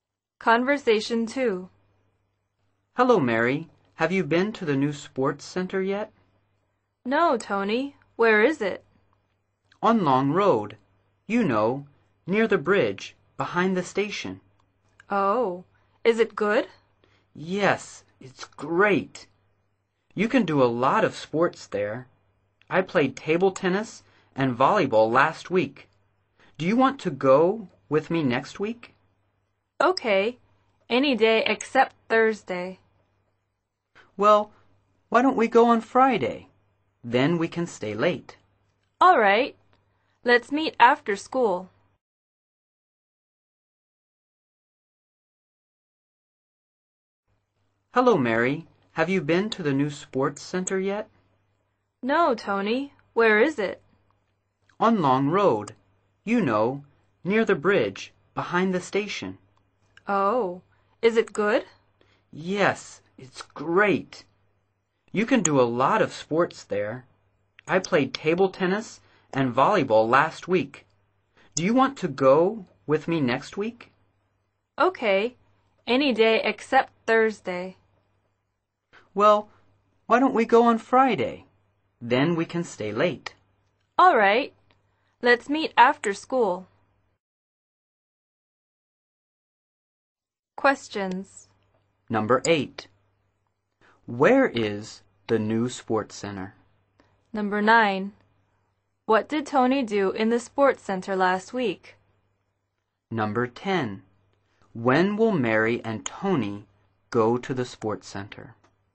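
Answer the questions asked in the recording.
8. On Long Road, near the bridge, behind the station
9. Played table tennis and volleyball
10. On Friday after school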